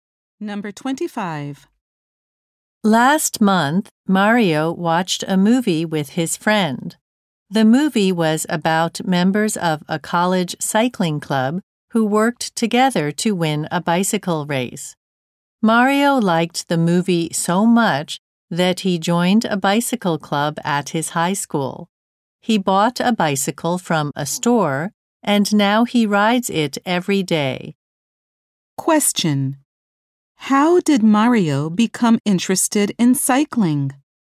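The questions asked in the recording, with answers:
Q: How did Mario become interested in cycling?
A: He watched a movie about a cycling club.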